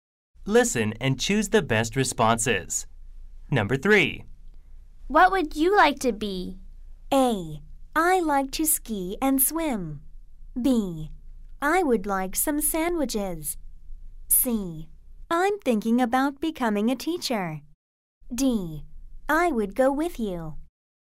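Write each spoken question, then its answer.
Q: What would you like to be?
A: C: I'm thinking about becoming a teacher.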